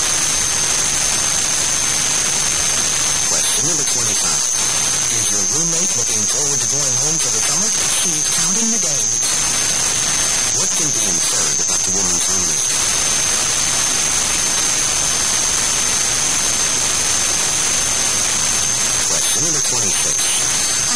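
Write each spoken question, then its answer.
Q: What can be inferred about the woman's roommate?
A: She is eager to go home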